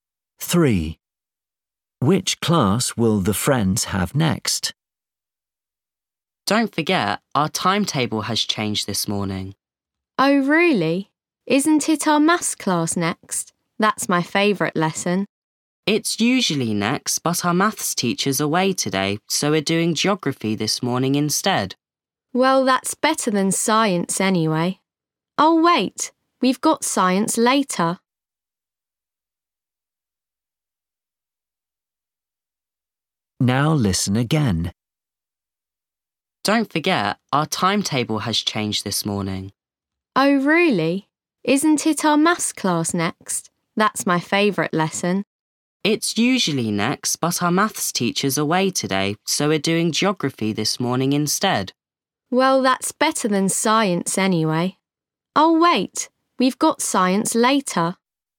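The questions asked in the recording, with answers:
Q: Which class will the friends have next?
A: Geography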